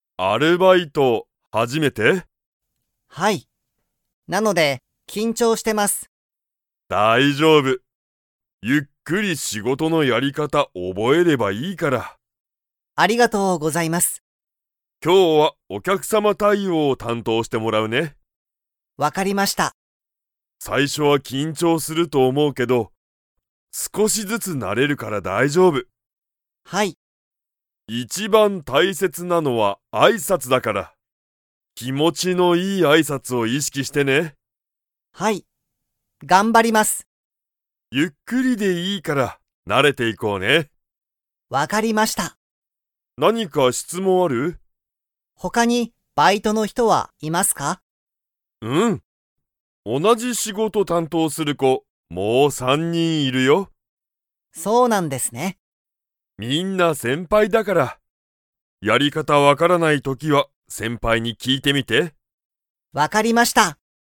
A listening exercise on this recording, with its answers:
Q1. 鈴木すずきさんにとって、これが初はじめてのアルバイトですか?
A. はい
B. いいえ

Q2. 店長てんちょうは、仕事しごとで一番いちばん大切たいせつなのは だと思おもっている。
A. お客様きゃくさま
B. 緊張きんちょう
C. 先輩せんぱい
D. 挨拶あいさつ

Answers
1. A. はい
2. D. 挨拶あいさつ

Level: Level 4

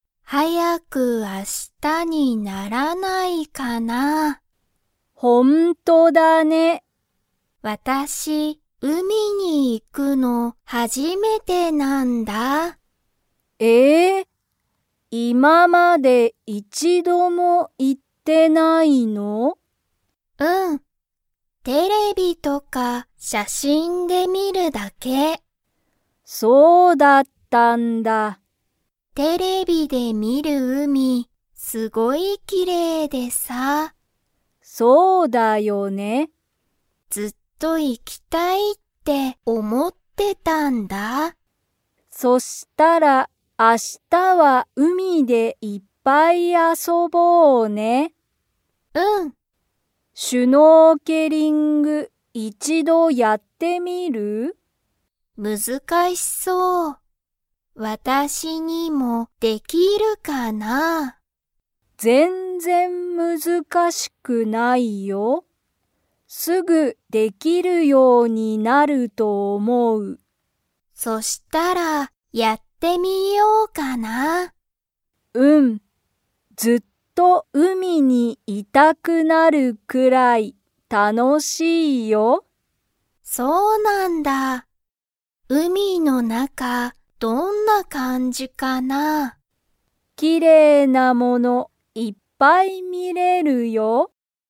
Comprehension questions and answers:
Comprehension Quiz (Skip if you don't understand the conversation yet)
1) サワとミナミは、明日(あした)海(うみ)で_____。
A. 写真(しゃしん)を見(み)る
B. いっぱい遊(あそ)ぶ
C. テレビを見(み)る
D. ずっとやる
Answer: B. いっぱい遊(あそ)ぶ

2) サワは、シュノーケリングをやってみますか?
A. はい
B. いいえ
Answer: A. はい

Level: Level 2

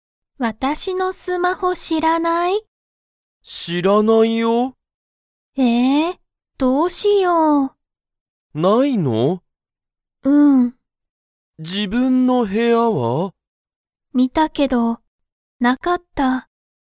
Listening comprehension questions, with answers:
Comprehension Quiz (Skip if you don't understand the conversation yet)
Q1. アミは、自分じぶんの部屋へやを見みましたか?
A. はい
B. いいえ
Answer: A. はい

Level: Level 1

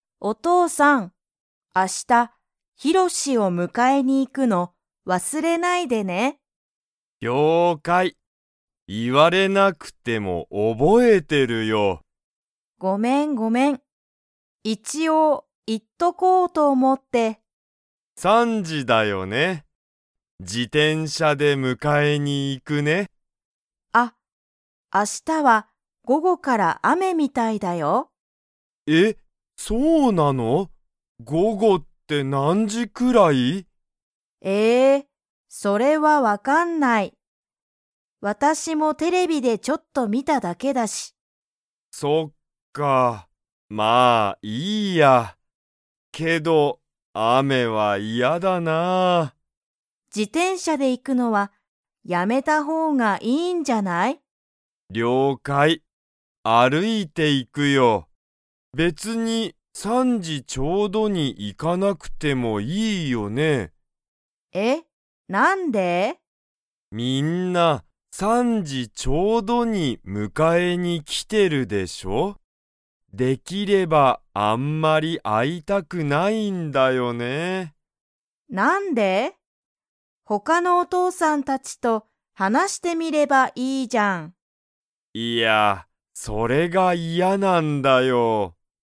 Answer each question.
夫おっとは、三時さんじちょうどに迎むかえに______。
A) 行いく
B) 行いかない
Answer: B) 行いかない

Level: Level 3

